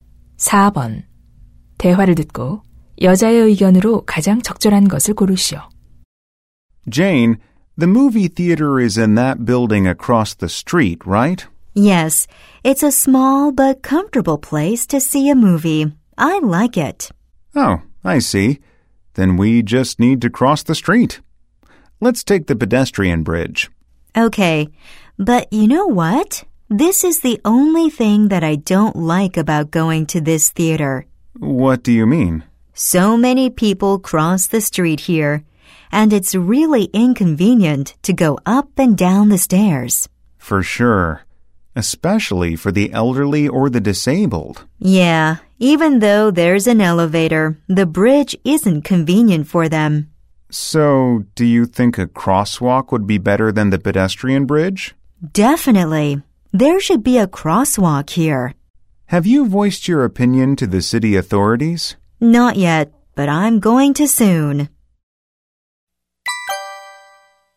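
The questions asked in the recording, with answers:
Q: 대화를 듣고 여자의 의견으로 가장 적절한 것을 고르시오.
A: 육교 대신 횡단보도를 설치해야 한다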